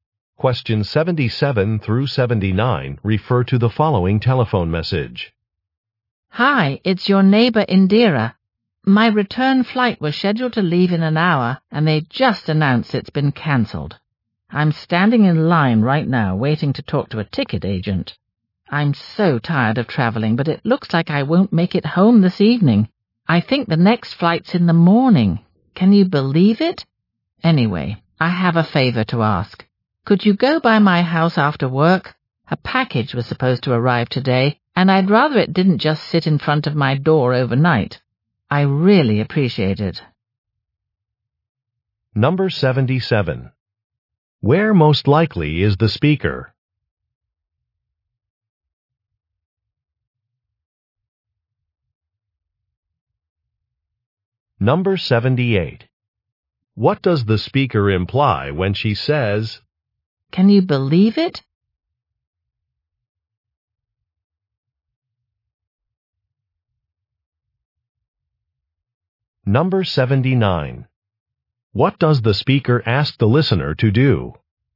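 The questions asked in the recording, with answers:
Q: Where most likely is the speaker?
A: At an airport

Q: What does the speaker ask the listener to do?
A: Go by her house and take in a package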